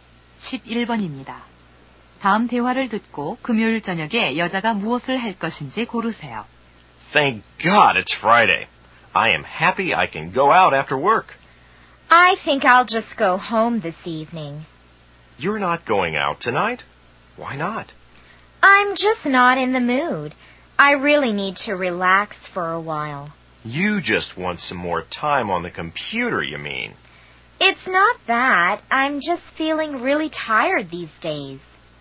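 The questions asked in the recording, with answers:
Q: 다음 대화를 듣고 금요일 저녁에 여자가 무엇을 할 것인지 고르세요.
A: 집에 가서 쉰다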